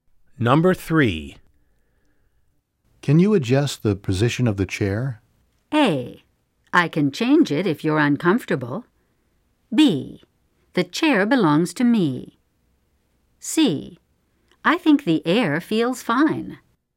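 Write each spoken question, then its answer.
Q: Can you adjust the position of the chair?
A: A: I can change it if you're uncomfortable.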